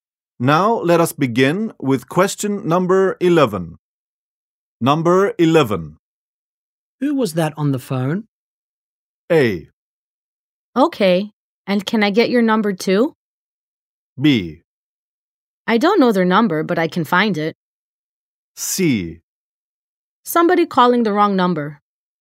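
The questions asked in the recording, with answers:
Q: Who was that on the phone?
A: C: Somebody calling the wrong number.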